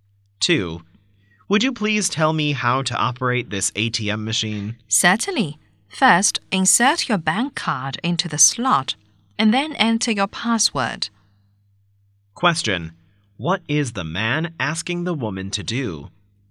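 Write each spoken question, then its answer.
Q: What is the man asking the woman to do?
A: Tell him how to operate the ATM machine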